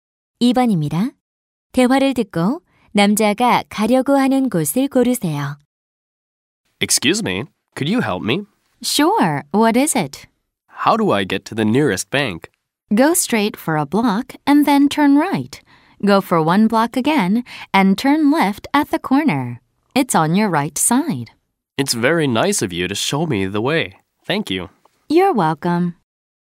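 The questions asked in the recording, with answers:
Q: 대화를 듣고 남자가 가려고 하는 곳을 고르세요.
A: 은행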